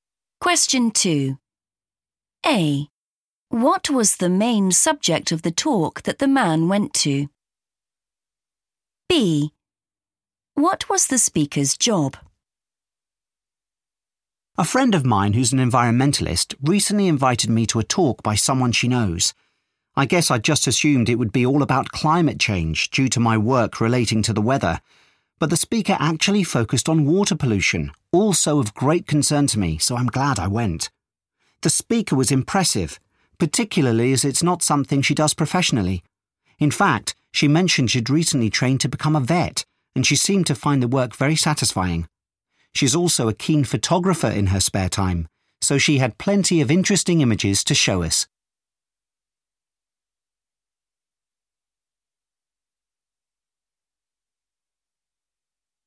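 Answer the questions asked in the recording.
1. water pollution
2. vet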